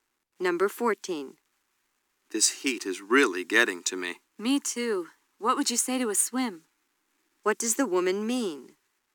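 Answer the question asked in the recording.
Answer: She suggests going for a swim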